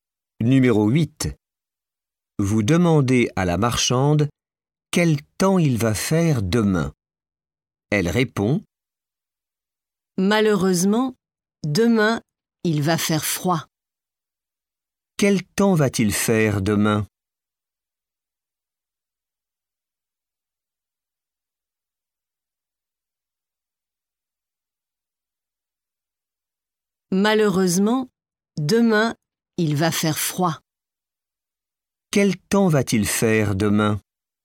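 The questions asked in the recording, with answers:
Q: Quel temps va-t-il faire demain?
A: Il va faire froid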